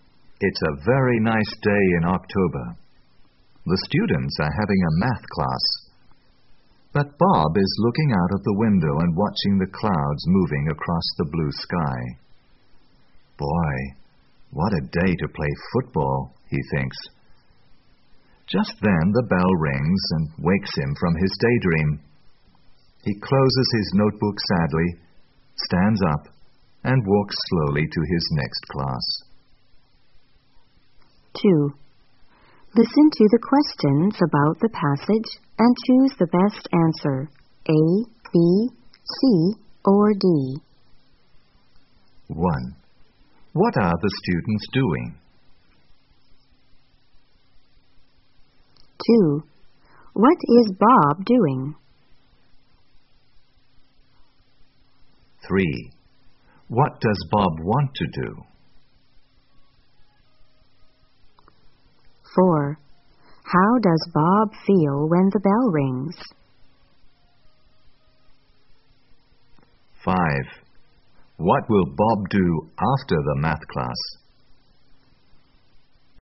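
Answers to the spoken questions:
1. Having a math class
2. Looking out of the window and watching the clouds
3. Play football
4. Sad
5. Go to his next class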